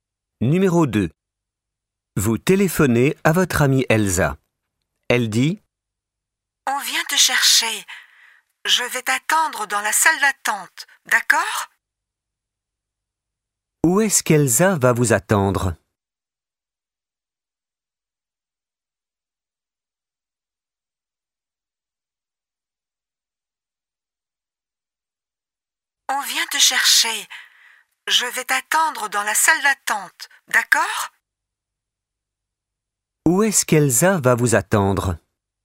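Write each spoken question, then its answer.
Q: Où est-ce qu'Elsa va vous attendre ?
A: Dans la salle d'attente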